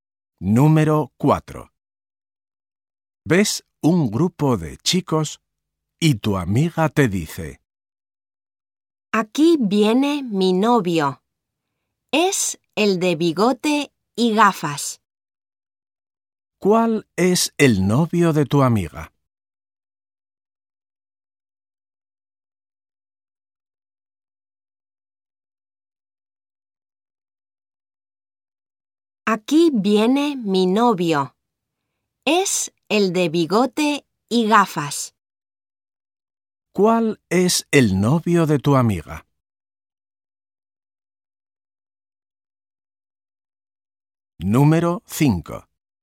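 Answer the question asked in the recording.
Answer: El de bigote y gafas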